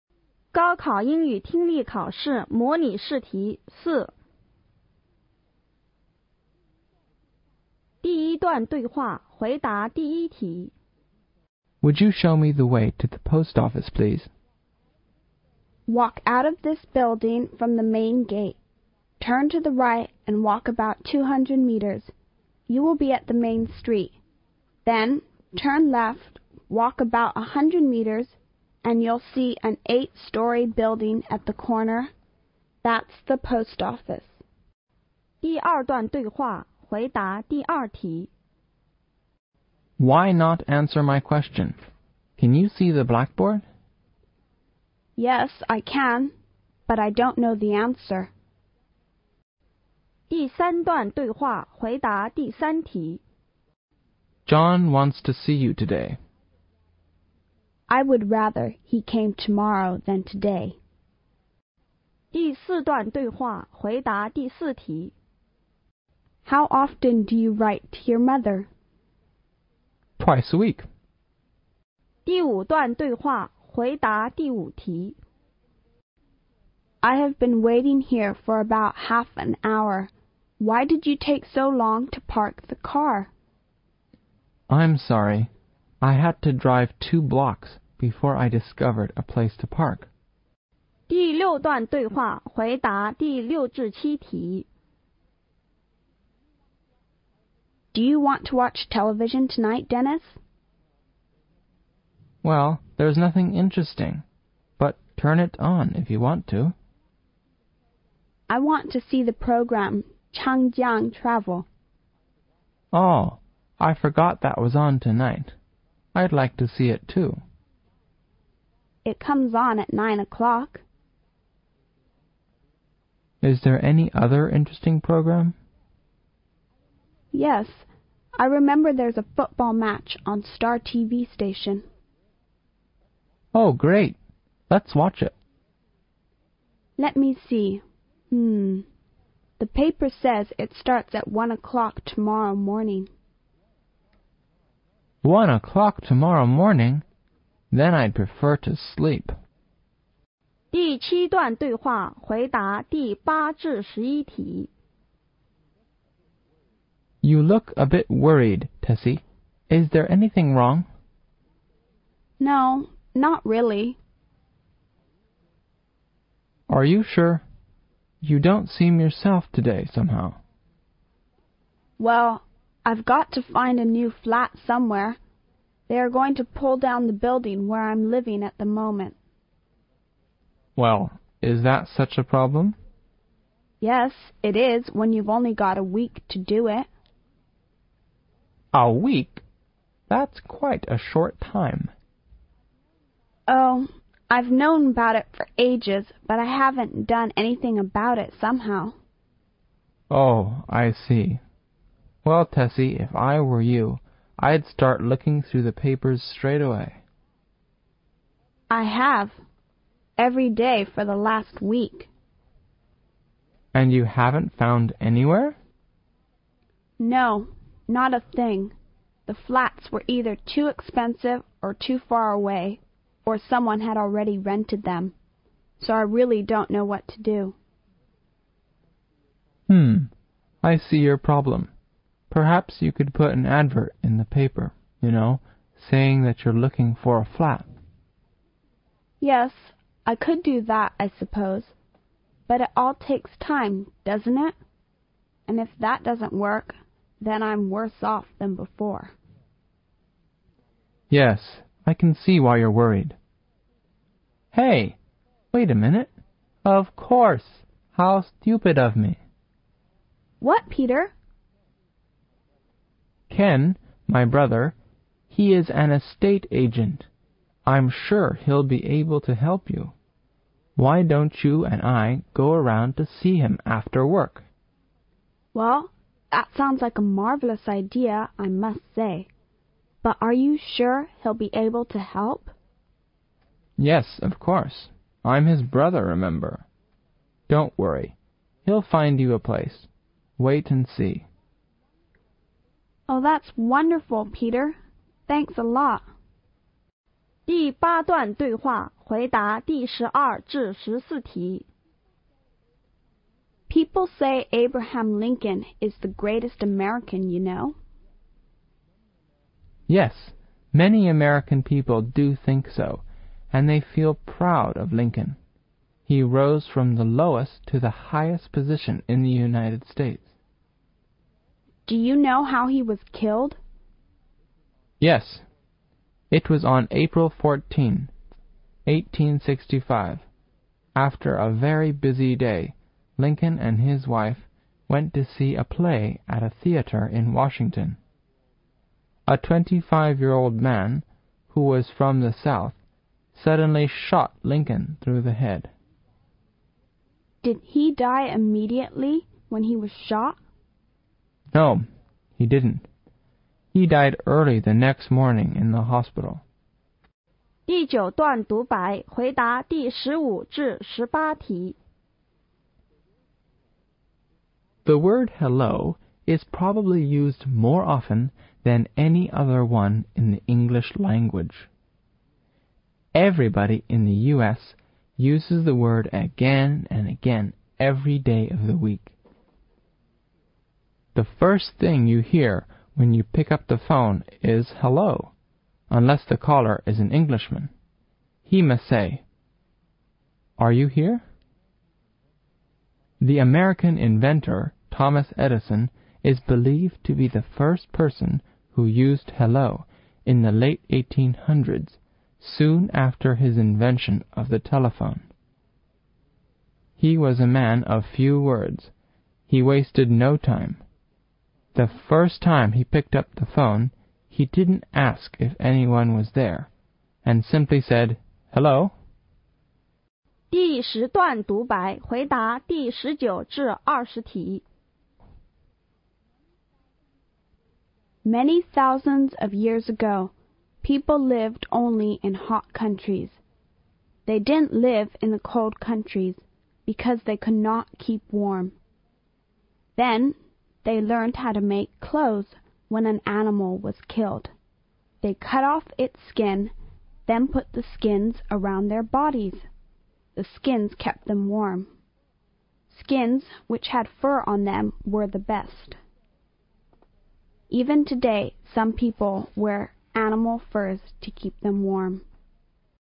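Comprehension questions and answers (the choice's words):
听力理解:第一节:听下面五段对话。每段对话后有一个问题。从题中所给的A,B,C选项中出最佳的选项。每段对话只听一遍。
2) What's the problem with the woman?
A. She couldn't see the blackboard.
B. She didn't hear clearly.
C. She couldn't understand the teacher's question.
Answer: She couldn't understand the teacher's question.

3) When will the woman meet John?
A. The day after tomorrow.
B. Tomorrow.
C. As soon as possible.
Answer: Tomorrow.

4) How many letters does he write to his mother in a mouth?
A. Eight.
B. Four.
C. Twelve.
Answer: Eight.

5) What can you learn from the conversation?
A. The man couldn't find a parking lot.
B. It's hard to find a place to leave the car.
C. The woman was worried about her late arrival.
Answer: It's hard to find a place to leave the car.

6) What are they talking about?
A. Changing Travel.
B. TV program.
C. Sleeping.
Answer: TV program.

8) Why does Tessie have to change her living place?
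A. Because she does not like the place she is now living in.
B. Because the house she is now living in will be pulled down.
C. Because she can not afford the rent.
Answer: Because the house she is now living in will be pulled down.

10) Which of the following is not the reason that Tessie failed to rent a house?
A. Its condition is too bad.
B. It has already been rented.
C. It was too expensive.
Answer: Its condition is too bad.

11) Why does Tessie not want to put an advertisement in the paper?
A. Because it takes time.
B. Because it is too expensive.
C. Because it doesn't work at all.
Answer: Because it takes time.

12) Who shot Abraham Lincoln?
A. His wife.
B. A player at the theatre.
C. A young man of 25.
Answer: A young man of 25.

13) When did Lincoln die?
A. On the evening of April 14,1865.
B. On the morning of April 14,1865.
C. On the morning of April 15,1865.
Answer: On the morning of April 15,1865.

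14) Where did Lincoln die?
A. At a theatre.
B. At the hospital.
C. On the way home.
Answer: At the hospital.

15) What does the passage tells you about mainly?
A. The passage tells us something about the telephone.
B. The passage tells us something about Edison.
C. Where the word"Hello"comes from.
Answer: Where the word"Hello"comes from.

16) Which country is Thomas Edison's homeland?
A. America.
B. Britain.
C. Germany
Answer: America.

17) When did the word"Hello"appear at first?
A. In 18th century.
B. In the late 19th century.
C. About 1900.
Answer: In the late 19th century.

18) Which of the following sentences in false according to passage?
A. Edison was probably the first person who used"Hello".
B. Edison was a great inventor in the world.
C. Edison liked to make speeches in the public.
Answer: Edison liked to make speeches in the public.

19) Where did people live many thousands of years ago?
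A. Only in hot countries.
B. Only in cold countries.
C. Sometimes in hot countries and sometimes in cold countries.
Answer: Only in hot countries.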